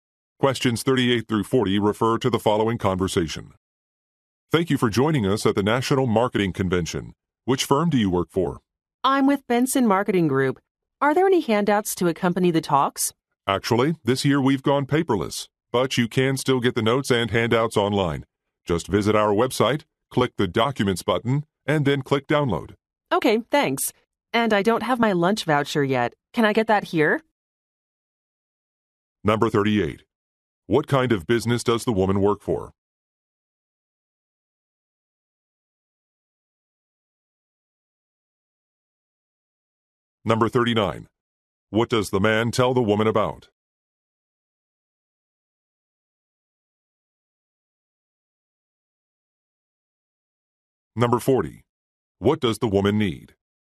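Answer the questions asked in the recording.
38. A marketing firm
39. How to get the handouts online
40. A lunch voucher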